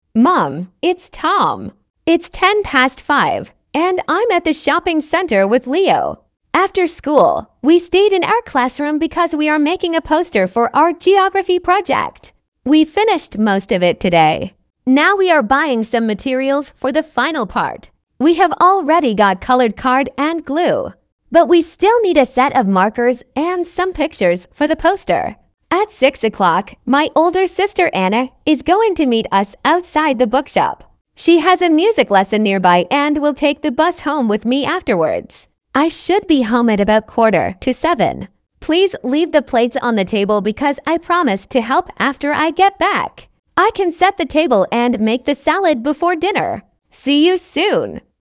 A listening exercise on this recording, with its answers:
Прослушайте текст и определите, какие из приведённых утверждений A–E соответствуют содержанию текста — 1 (True), а какие не соответствуют — 2 (False). Вы услышите текст дважды.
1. Tom is calling from the school sports hall.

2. Tom stayed after school to work on a class project.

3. Tom and Leo have already bought all the materials they need.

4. Tom is going to meet his older sister later today.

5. Tom promises to help at home when he returns.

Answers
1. False
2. True
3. False
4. True
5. True

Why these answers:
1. Том звонит из торгового центра, а не из школьного спортивного зала.
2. После уроков Том и Лео остались в классе, чтобы работать над плакатом для проекта по географии.
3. Они уже купили картон и клей, но им всё ещё нужны маркеры и картинки.
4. В шесть часов Том собирается встретиться со своей старшей сестрой Анной.
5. Том обещал помочь дома: накрыть на стол и приготовить салат.

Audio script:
After school, we stayed in our classroom because we are making a poster for our geography project. We finished most of it today.
Now we are buying some materials for the final part. We have already got coloured card and glue, but we still need a set of markers and some pictures for the poster.
At six o'clock, my older sister Anna is going to meet us outside the bookshop. She has a music lesson nearby and will take the bus home with me afterwards.
I should be home at about quarter to seven. Please leave the plates on the table because I promised to help after I get back. I can set the table and make the salad before dinner.
See you soon.